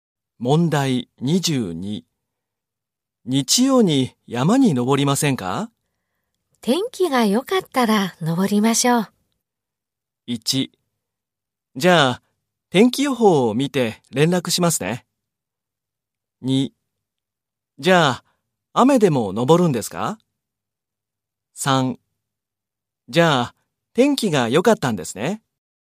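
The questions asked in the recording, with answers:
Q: 日曜に山に登りませんか?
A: 1: じゃあ天気予報を見て連絡しますね。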